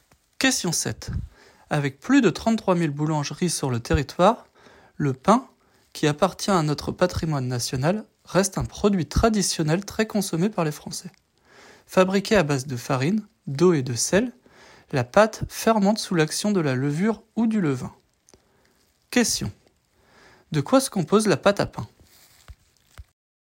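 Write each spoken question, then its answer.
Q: De quoi se compose la pâte à pain ?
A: De farine, d'eau et de sel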